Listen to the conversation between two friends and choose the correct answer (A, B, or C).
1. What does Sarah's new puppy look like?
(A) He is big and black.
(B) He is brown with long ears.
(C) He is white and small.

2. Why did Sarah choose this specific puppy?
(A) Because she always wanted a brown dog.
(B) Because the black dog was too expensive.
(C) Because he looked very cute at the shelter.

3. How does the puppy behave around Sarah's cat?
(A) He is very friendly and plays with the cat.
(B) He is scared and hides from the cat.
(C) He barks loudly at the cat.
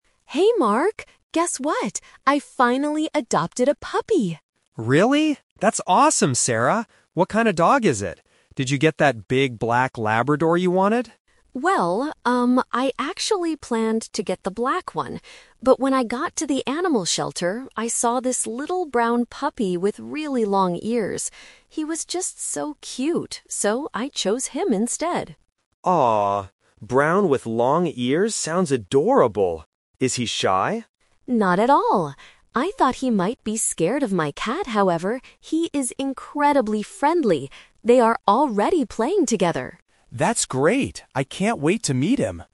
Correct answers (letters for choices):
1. B
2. C
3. A

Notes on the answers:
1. Sarah describes her new dog as a "little brown puppy with really long ears." Option A is the trap; Mark mentions a "big black Labrador," and Sarah admits she planned to get it, but she changed her mind. Option C is not mentioned.
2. Sarah says, "He was just so cute, so I chose him instead." Options A and B are not mentioned in the audio.
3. Sarah says the puppy is "incredibly friendly" and that they are "already playing together." Option B is the trap; Sarah says she thought he might be scared, but he actually wasn't.

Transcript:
Sarah: Hey Mark! Guess what? I finally adopted a puppy!
Mark: Really? That's awesome, Sarah! What kind of dog is it? Did you get that big black Labrador you wanted?
Sarah: Well, um, I actually planned to get the black one. But when I got to the animal shelter, I saw this little brown puppy with really long ears. He was just so cute, so I chose him instead.
Mark: Aww, brown with long ears sounds adorable. Is he shy?
Sarah: Not at all! I thought he might be scared of my cat, however, he is incredibly friendly.